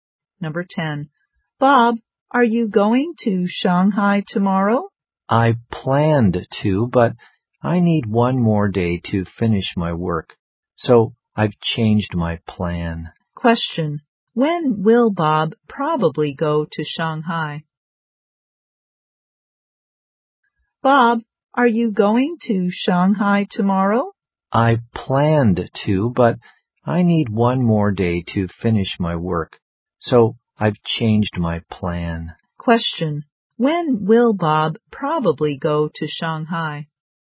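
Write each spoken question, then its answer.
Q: When will Bob probably go to Shanghai?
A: The day after tomorrow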